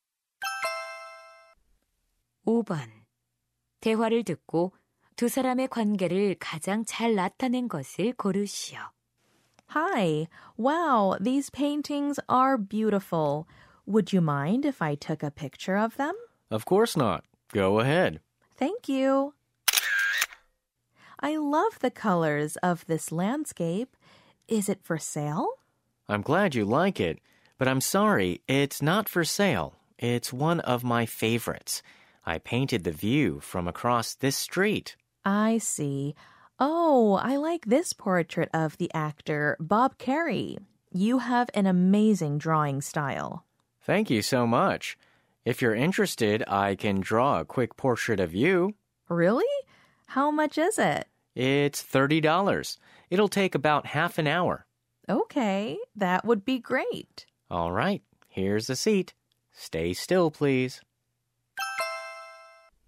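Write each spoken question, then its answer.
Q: 대화를 듣고 두 사람의 관계를 가장 잘 나타낸 것을 고르시오.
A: 거리 화가 - 손님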